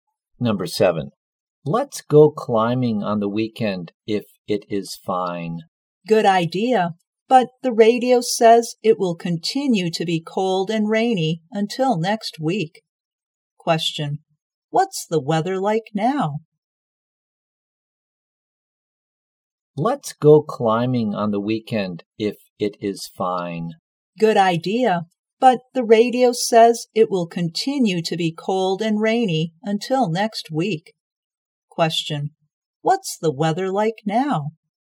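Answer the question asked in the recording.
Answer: Cold and rainy.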